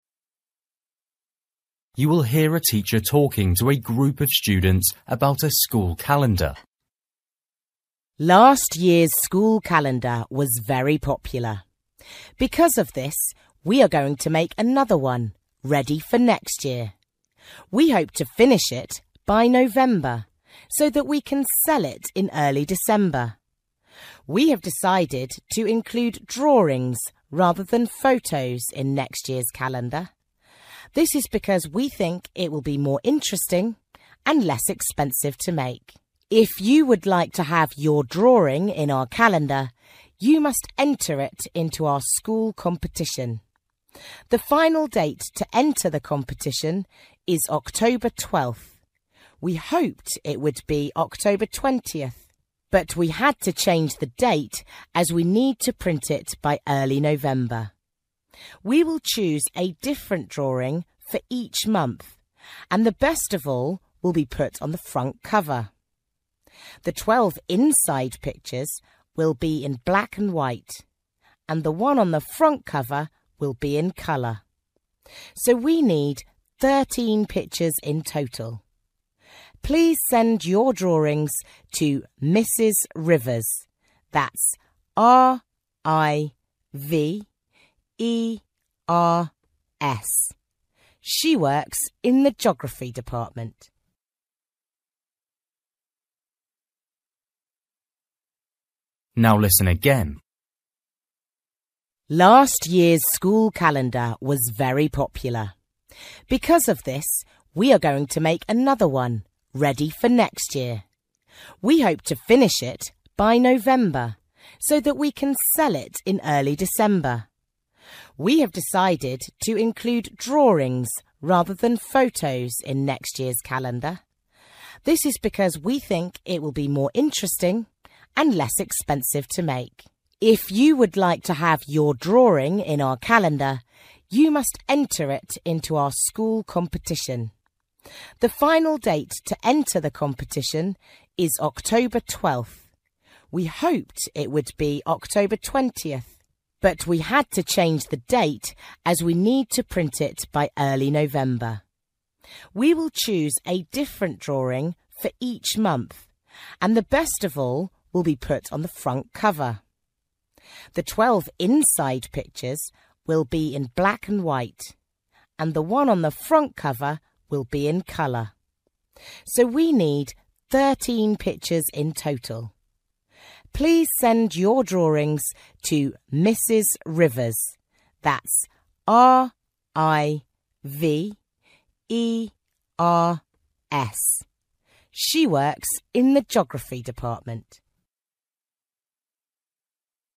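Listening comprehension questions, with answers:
For each question, write the correct answer in the gap. Write one word or a number or a date or a time.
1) Start to sell calendars in: (1)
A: December

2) Last date to enter competition: (2)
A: October 12th

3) Front picture will be: (3) in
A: colour

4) Total number of pictures: (4)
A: 13

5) Send your pictures to: (5) Mrs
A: Rivers

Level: Luyện nghe trình độ A2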